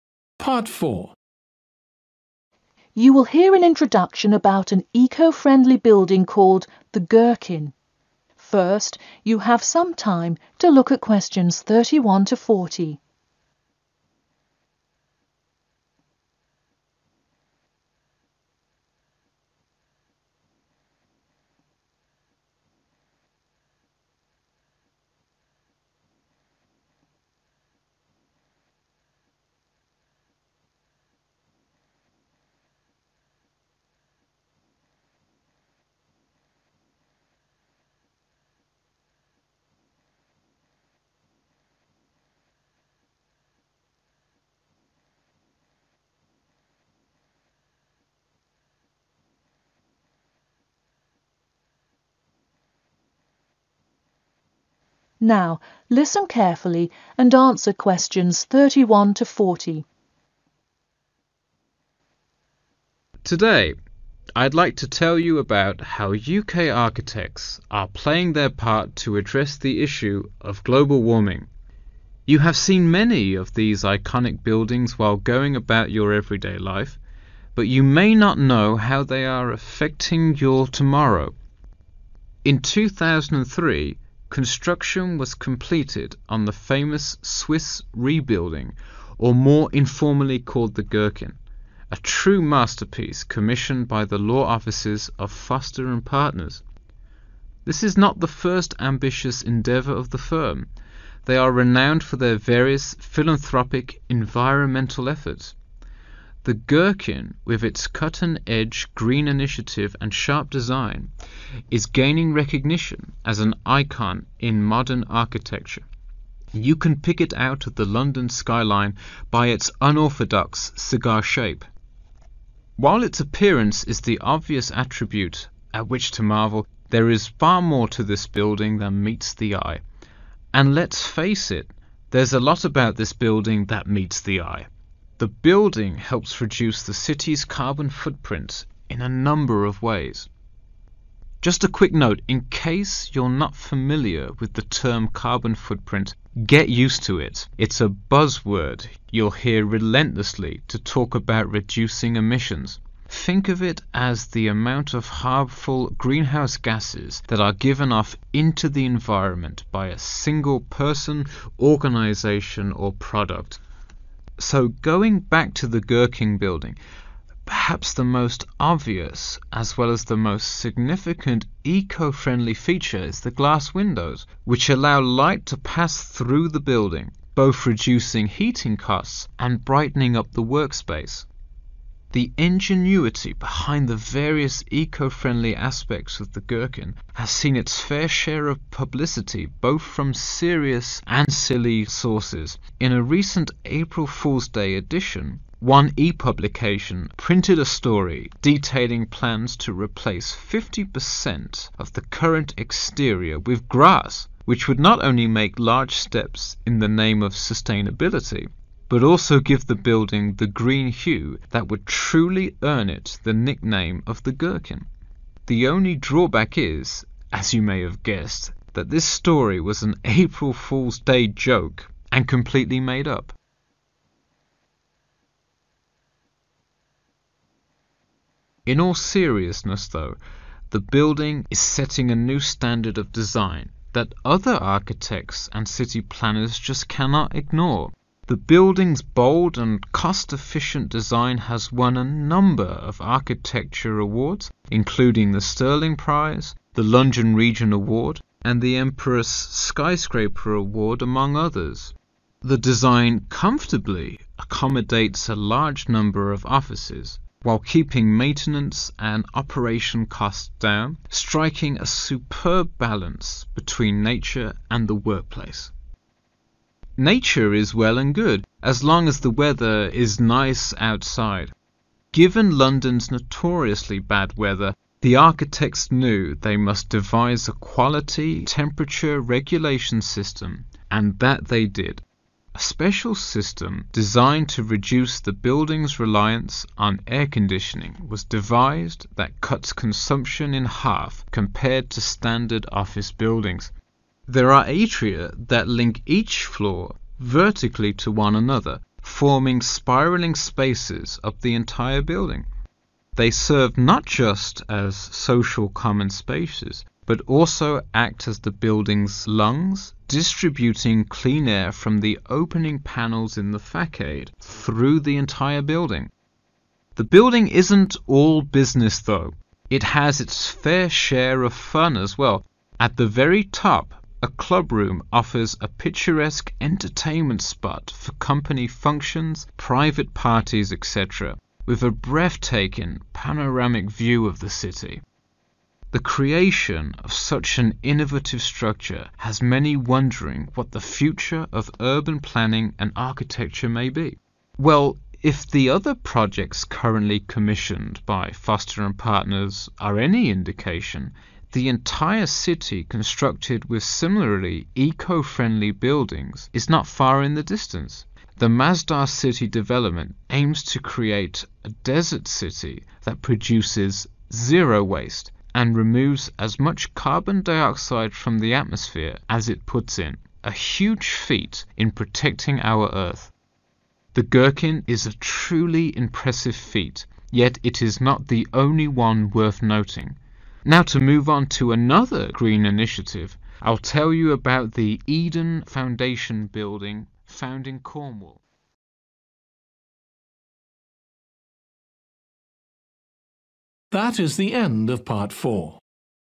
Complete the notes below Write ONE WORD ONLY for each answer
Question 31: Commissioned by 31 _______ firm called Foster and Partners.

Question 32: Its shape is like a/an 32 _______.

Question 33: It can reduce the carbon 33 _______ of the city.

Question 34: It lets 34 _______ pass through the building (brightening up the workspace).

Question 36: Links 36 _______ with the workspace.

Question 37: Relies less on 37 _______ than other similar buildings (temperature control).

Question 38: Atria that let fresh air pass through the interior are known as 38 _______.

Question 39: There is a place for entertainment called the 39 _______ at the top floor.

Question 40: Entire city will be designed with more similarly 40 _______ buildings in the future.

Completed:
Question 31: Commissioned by law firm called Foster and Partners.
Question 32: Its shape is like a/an cigar.
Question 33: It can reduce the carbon footprint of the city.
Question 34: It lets light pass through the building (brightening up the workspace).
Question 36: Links nature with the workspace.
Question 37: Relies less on air-conditioning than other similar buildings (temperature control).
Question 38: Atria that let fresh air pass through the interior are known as lungs.
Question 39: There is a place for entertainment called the clubroom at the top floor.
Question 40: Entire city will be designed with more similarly eco-friendly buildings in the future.